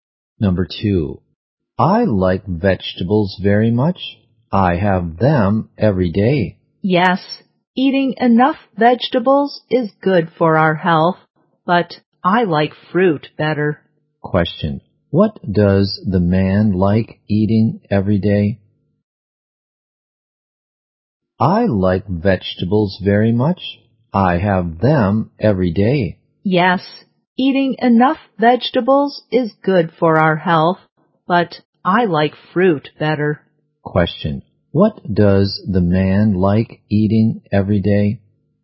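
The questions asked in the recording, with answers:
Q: what does the man like eating every day?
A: Vegetables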